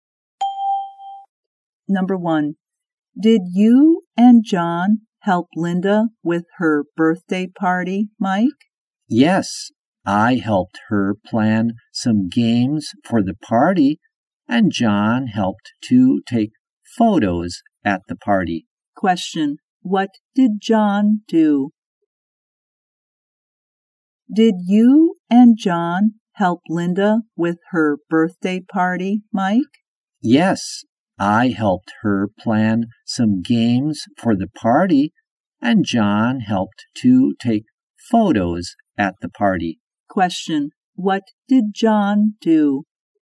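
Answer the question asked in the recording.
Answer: He helped to take photos at the party.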